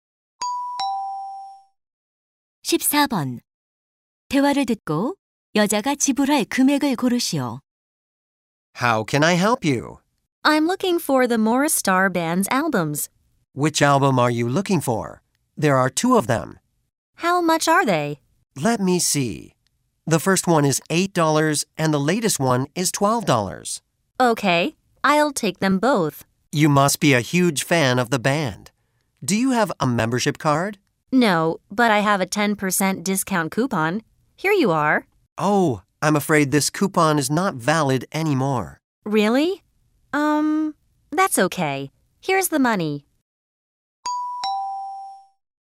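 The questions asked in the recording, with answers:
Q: 대화를 듣고 여자가 지불할 금액을 고르시오.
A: $20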